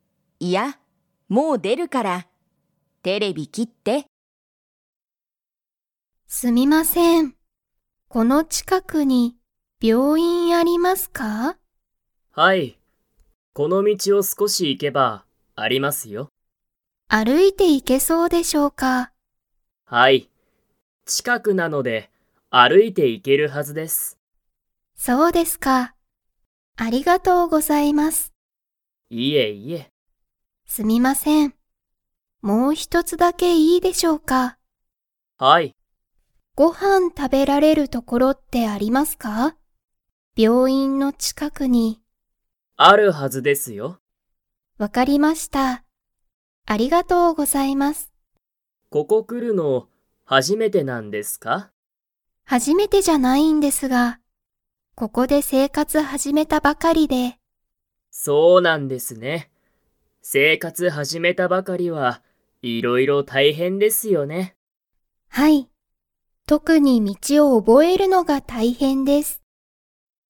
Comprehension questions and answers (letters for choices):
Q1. 病院びょういんの近ちかくに、____所ところがある。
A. 歩あるいて行いけない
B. ご飯はんを食たべられる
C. 生活せいかつを始はじめる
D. 道みちを覚おぼえる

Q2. 山田やまださんは、ここに来くるのが初はじめてですか?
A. はい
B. いいえ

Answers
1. B
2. B

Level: Level 2